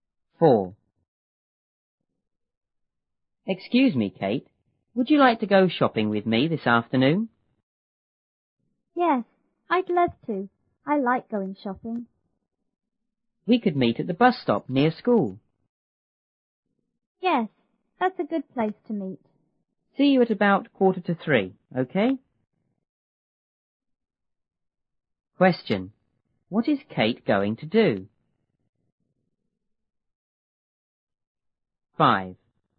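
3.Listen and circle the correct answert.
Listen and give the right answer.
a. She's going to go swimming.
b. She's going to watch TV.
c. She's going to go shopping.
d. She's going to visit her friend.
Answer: c. She's going to go shopping.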